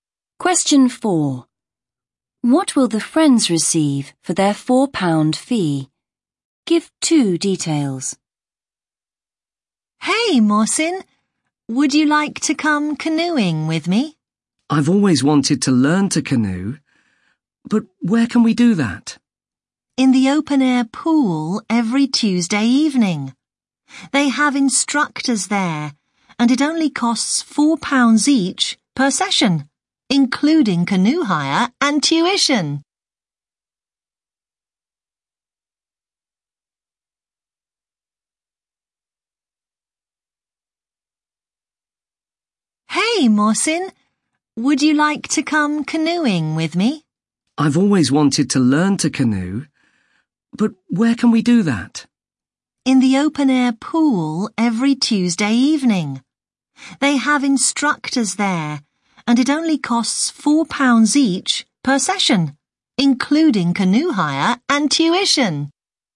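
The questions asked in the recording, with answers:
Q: What will the friends receive for their £4 fee?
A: Canoe hire and tuition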